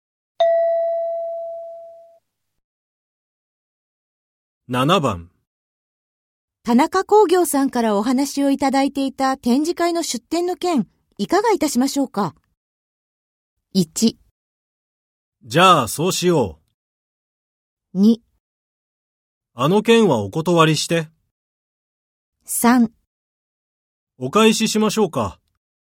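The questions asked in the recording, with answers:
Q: 田中工業さんからお話をいただいていた展示会の出展の件、いかがいたしましょうか。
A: 2: あの件はお断りして。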